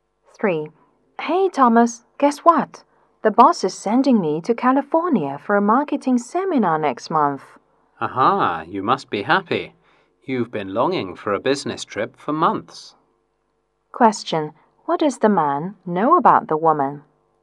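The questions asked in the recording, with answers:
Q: what does the man know about the woman?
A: She has been longing for a business trip for months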